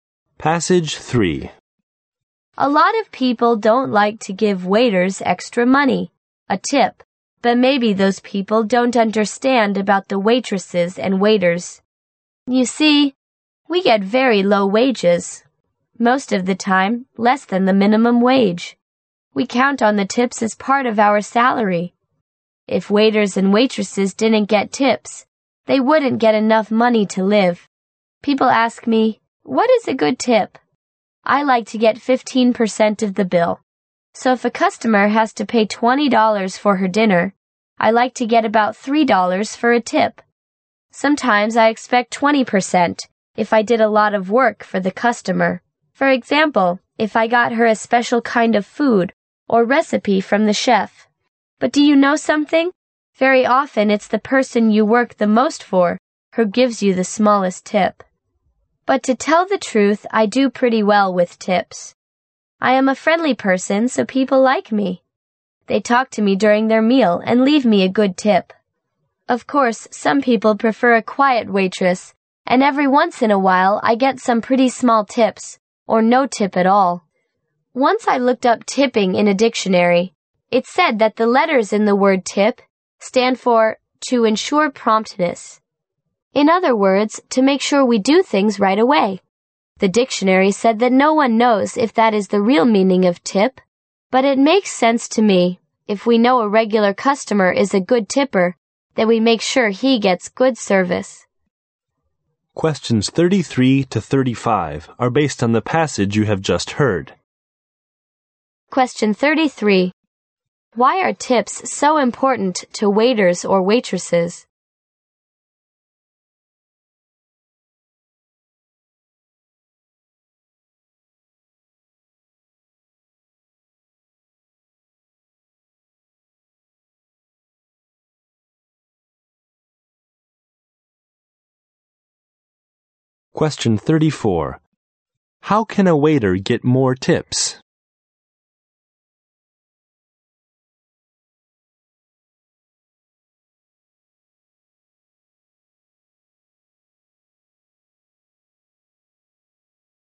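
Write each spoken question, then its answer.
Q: Why are tips so important to waiters or waitresses?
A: Their wages are very low, so tips are part of their salary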